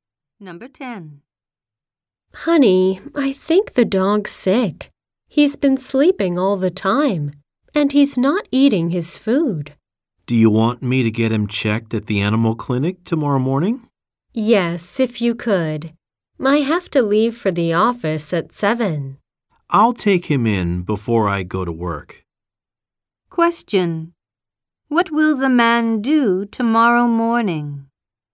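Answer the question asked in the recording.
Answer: Take the dog to the animal clinic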